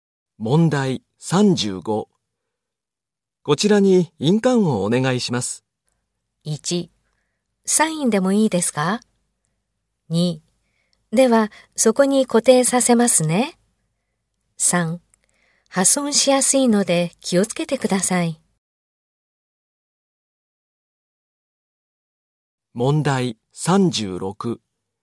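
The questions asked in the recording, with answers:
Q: こちらに印鑑をお願いします。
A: 1: サインでもいいですか?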